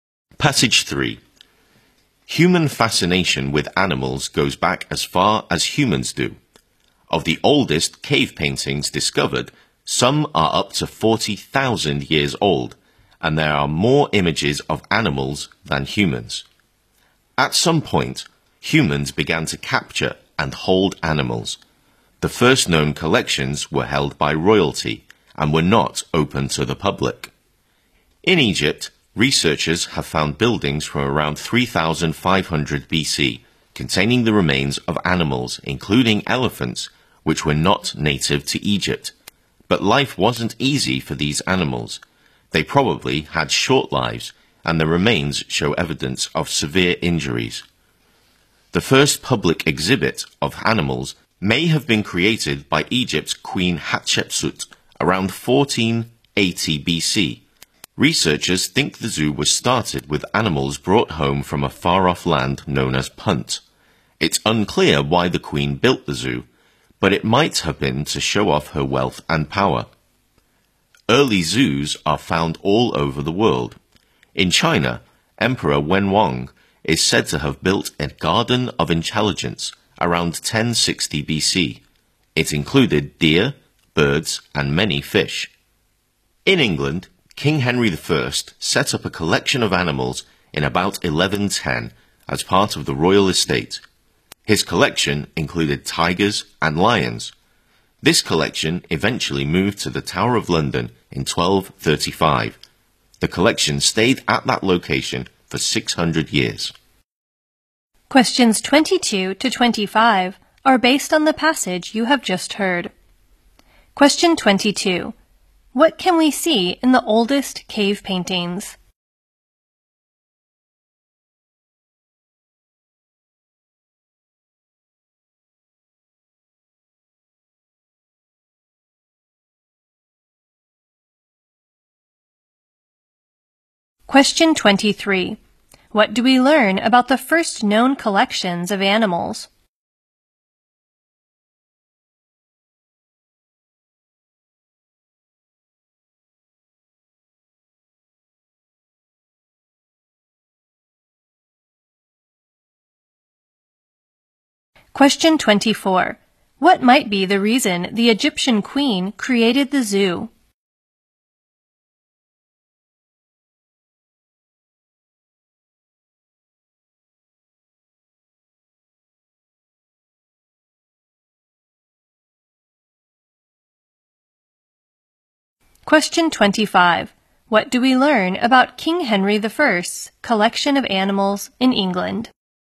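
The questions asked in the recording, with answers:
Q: What can we see in the oldest cave paintings?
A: More images of animals than of humans

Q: What do we learn about the first known collections of animals?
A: Royalty kept them, and they were not open to the public.

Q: What might be the reason the Egyptian queen created the zoo?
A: To show off her wealth and power

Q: What do we learn about King Henry I's collection of animals in England?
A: It included tigers and lions, moved to the Tower of London in 1235 and stayed there 600 years.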